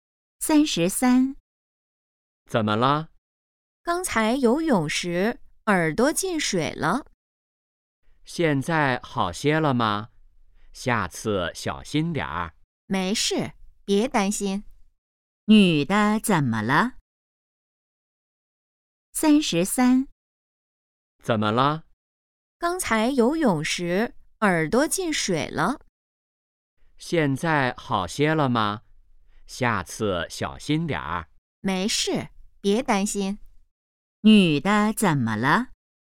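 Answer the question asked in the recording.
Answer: 游泳时耳朵进水了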